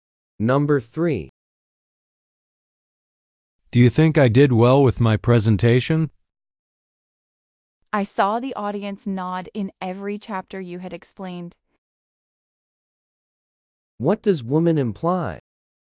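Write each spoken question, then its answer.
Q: What does woman imply?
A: The presentation went well; the audience understood and agreed.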